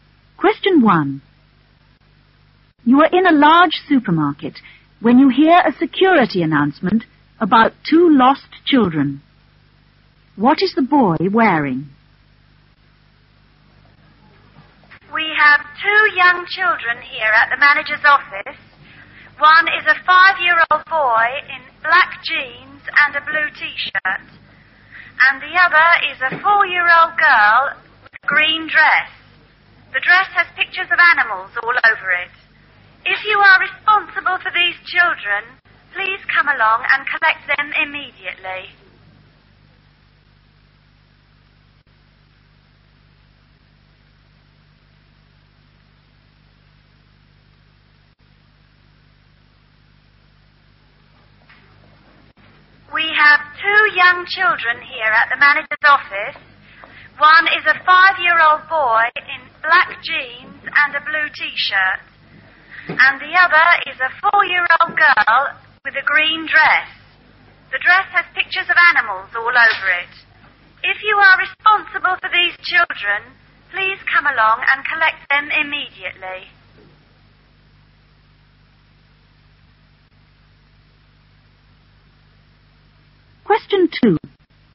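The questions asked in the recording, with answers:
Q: What is the boy wearing?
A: Black jeans and a blue t-shirt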